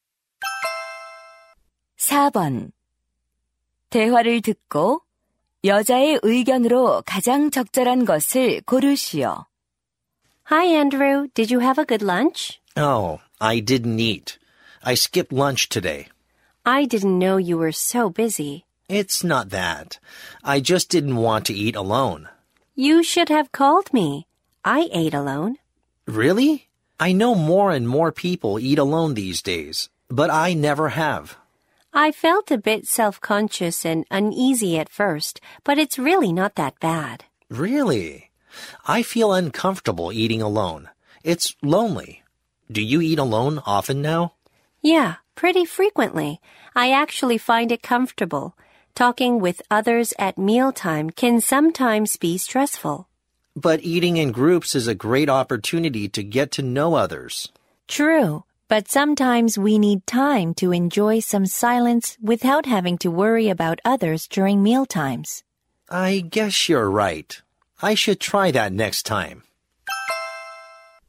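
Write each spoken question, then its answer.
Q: 대화를 듣고 여자의 의견으로 가장 적절한 것을 고르시오.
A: 때로는 혼자 식사하는 것도 좋다.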